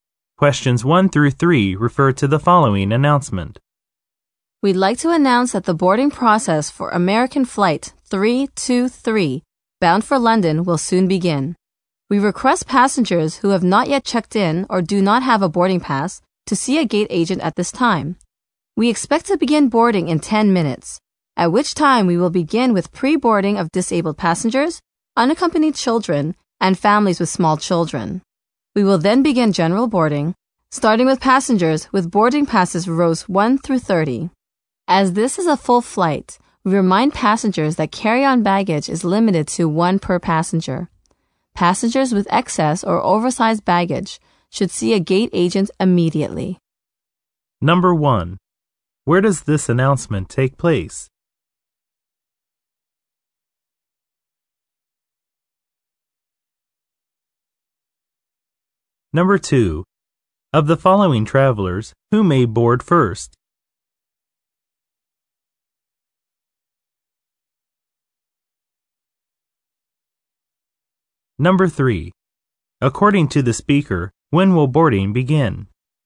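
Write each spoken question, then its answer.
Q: Where does this announcement take place?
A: At an airport gate

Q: Of the following travelers, who may board first?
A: Disabled passengers, unaccompanied children, and families with small children

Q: According to the speaker, when will boarding begin?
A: In 10 minutes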